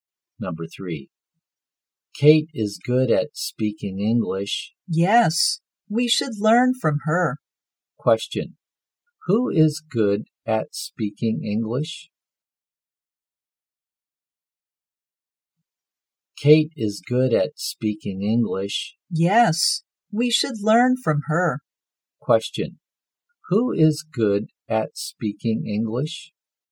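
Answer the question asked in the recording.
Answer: Kate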